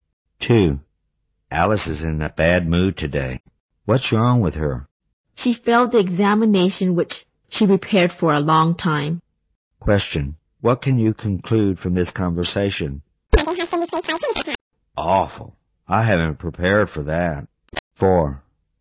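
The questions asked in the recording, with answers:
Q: What can you conclude from this conversation?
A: Alice failed the exam she had prepared for a long time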